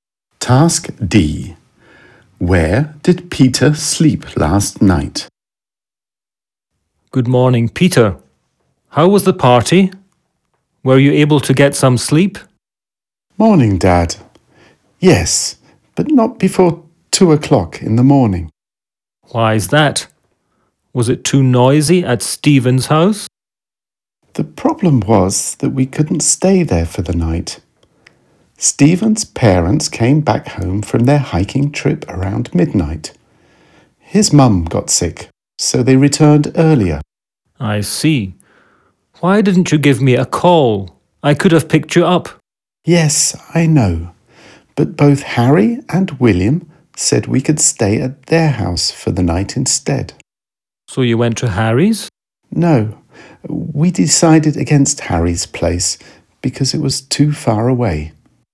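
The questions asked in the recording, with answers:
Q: Where did Peter sleep last night?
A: At William's house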